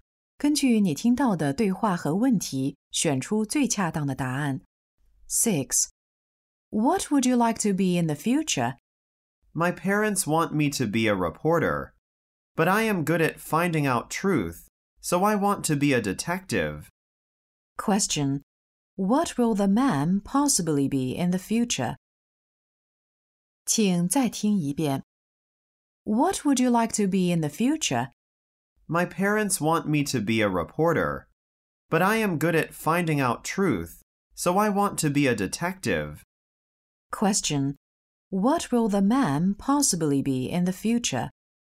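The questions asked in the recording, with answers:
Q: What will the man possibly be in the future?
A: A detective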